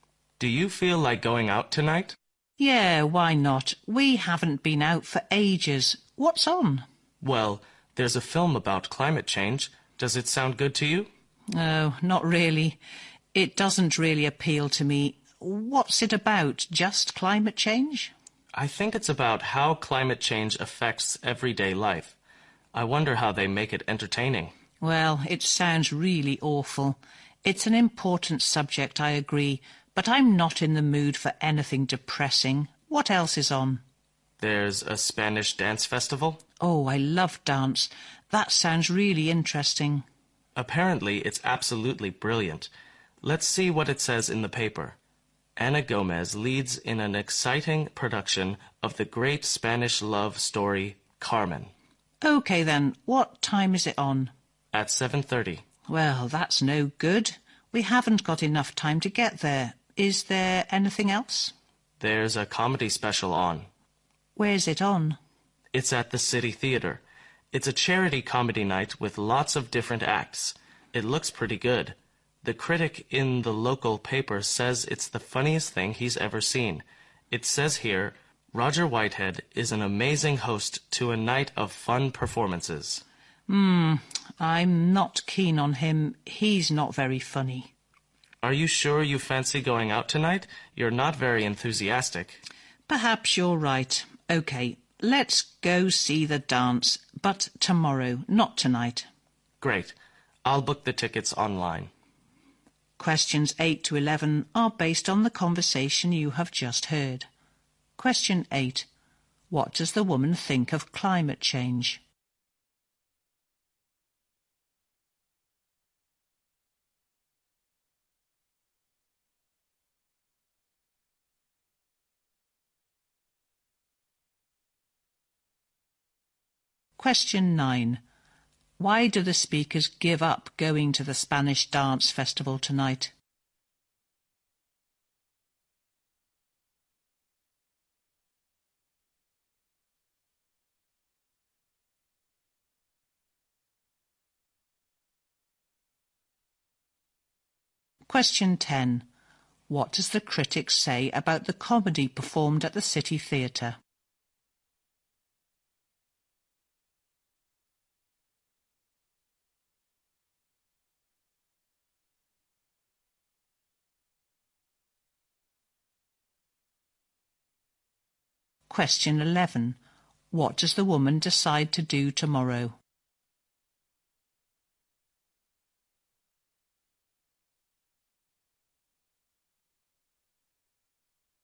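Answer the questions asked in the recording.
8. It is an important subject.
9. They don't have enough time to get there.
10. It is the funniest thing he has ever seen.
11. Go to see the Spanish dance.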